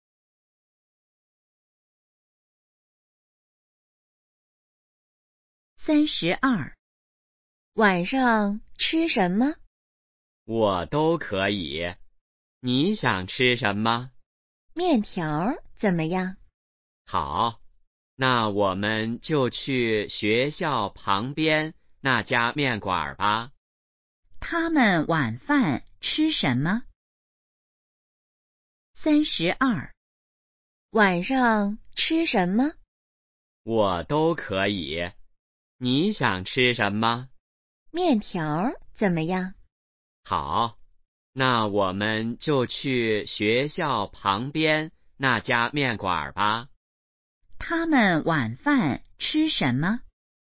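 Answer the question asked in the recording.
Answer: 面条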